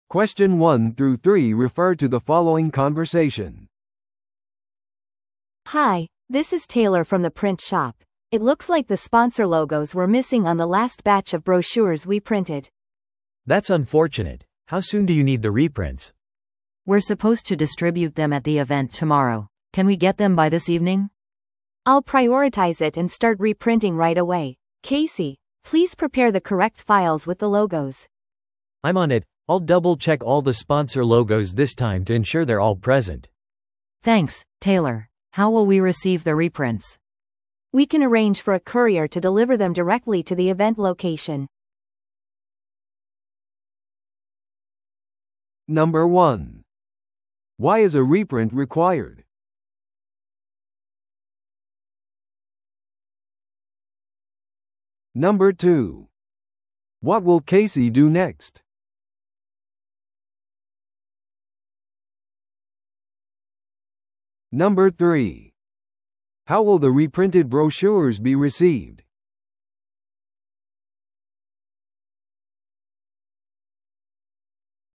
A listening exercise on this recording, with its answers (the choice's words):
Listen to the audio below and answer the questions.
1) Why is a reprint required?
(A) パンフレットが配達中に損傷した。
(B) イベントの日付が間違って印刷された。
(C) 紙の質が基準に達していなかった。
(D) スポンサーロゴがパンフレットから省かれていた。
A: スポンサーロゴがパンフレットから省かれていた。

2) What will Casey do next?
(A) パンフレットをイベントに配達する。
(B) スポンサーに連絡してロゴを手に入れる。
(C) 正しい印刷ファイルを準備する。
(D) エラーについてクライアントに謝罪する。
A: 正しい印刷ファイルを準備する。

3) How will the reprinted brochures be received?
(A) 印刷屋から直接受け取る。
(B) イベント会場への宅配便で。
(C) メールでデジタルファイルとして送信される。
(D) 翌日の通常郵便で配達される。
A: イベント会場への宅配便で。

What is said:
A: Hi, this is Taylor from the print shop. It looks like the sponsor logos were missing on the last batch of brochures we printed.
B: That's unfortunate. How soon do you need the reprints?
C: We're supposed to distribute them at the event tomorrow. Can we get them by this evening?
A: I'll prioritize it and start reprinting right away. Casey, please prepare the correct files with the logos.
B: I'm on it! I'll double-check all the sponsor logos this time to ensure they're all present.
C: Thanks, Taylor. How will we receive the reprints?
A: We can arrange for a courier to deliver them directly to the event location.